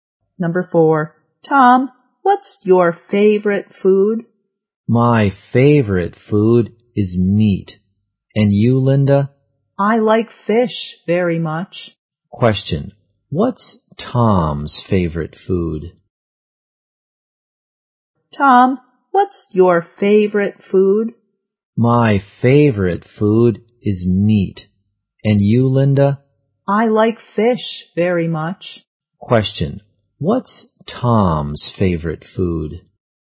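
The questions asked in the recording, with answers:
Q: Question, what's Tom's favorite food?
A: Meat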